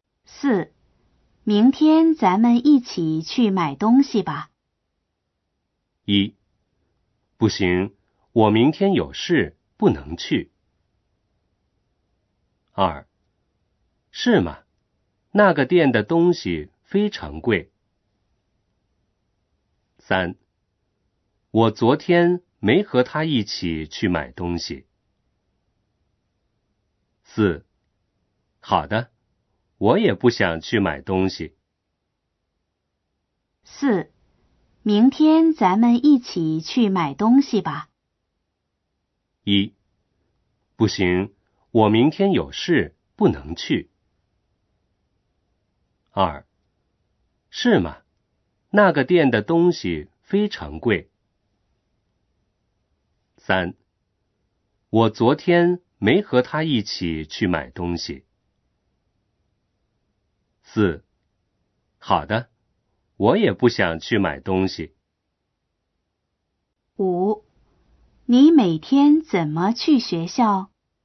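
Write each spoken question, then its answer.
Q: 明天咱们一起去买东西吧。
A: 一: 不行,我明天有事,不能去。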